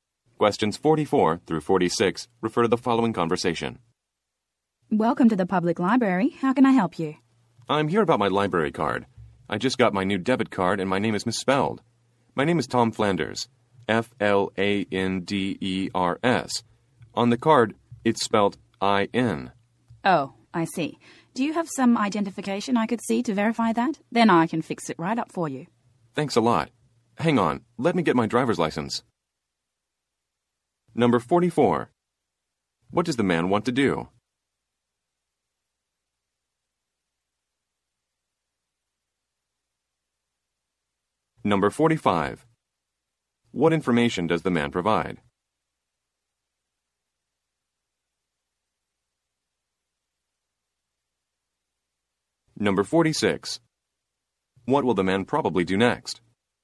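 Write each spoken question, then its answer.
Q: What does the man want to do?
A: Fix the misspelled name on his library card

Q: What will the man probably do next?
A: Show his driver's license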